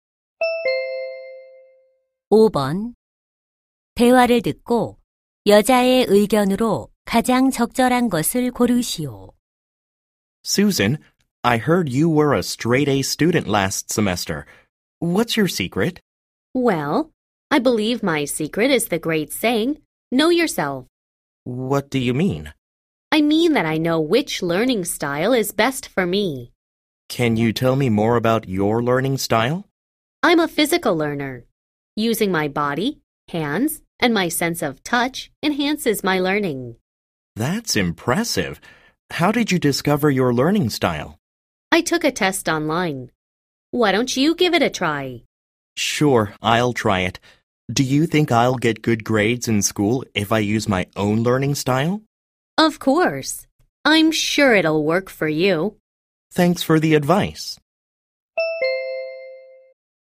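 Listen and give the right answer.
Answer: 자신에게 맞는 학습 방식을 알면 공부에 도움이 된다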